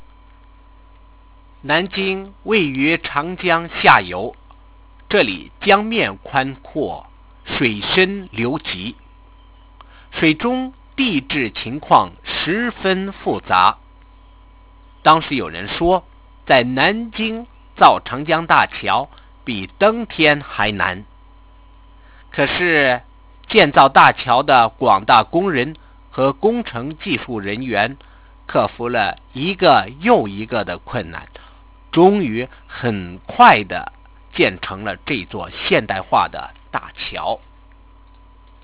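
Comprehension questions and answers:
Why was the bridge difficult to build?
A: The river at Nanjing is wide, the water is deep and fast-flowing, and the geology under the water is very complex.

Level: Second year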